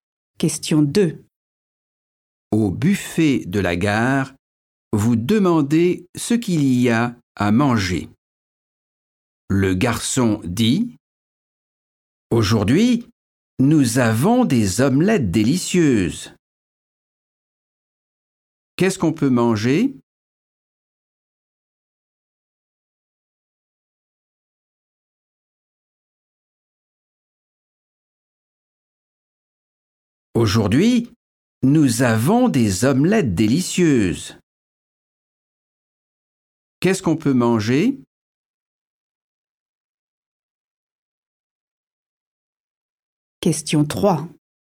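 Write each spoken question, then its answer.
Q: Qu'est-ce qu'on peut manger ?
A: des omelettes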